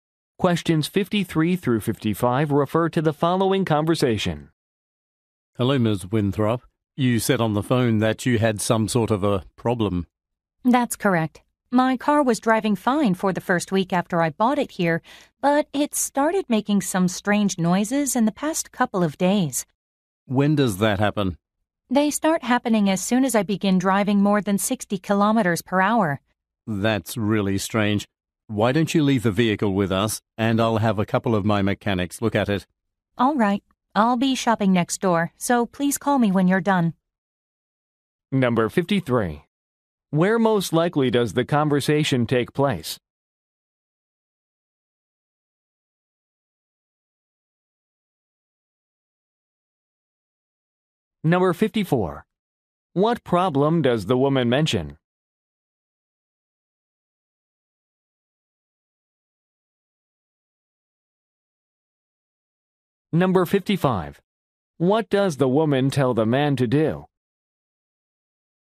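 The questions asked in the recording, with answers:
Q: Where most likely does the conversation take place?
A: At a car dealership/repair shop

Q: What problem does the woman mention?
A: Her car makes strange noises above 60 km/h

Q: What does the woman tell the man to do?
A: Call her when done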